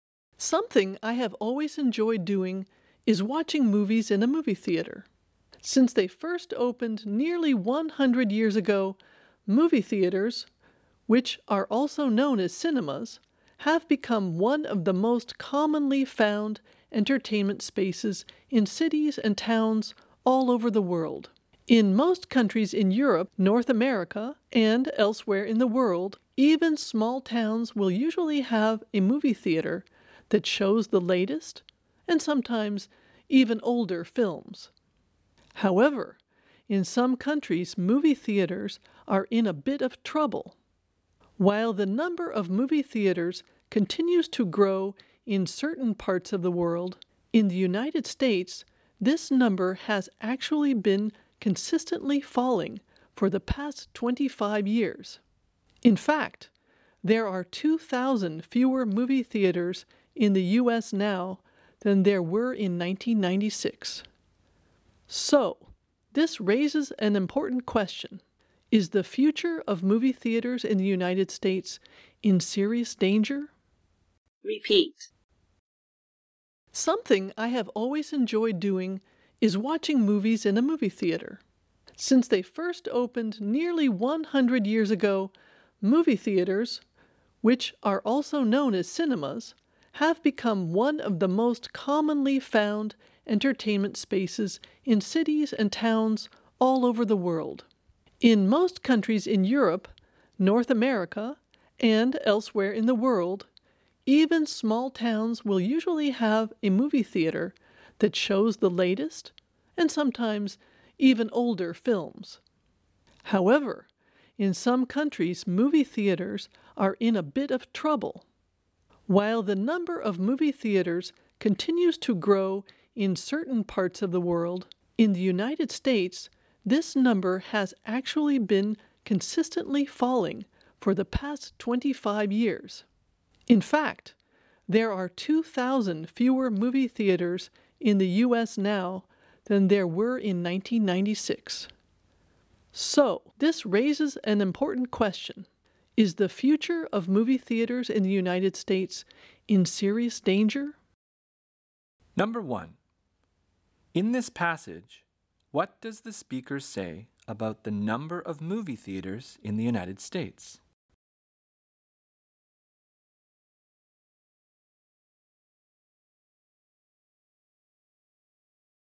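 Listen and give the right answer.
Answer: It has fallen steadily for 25 years, with 2,000 fewer than in 1996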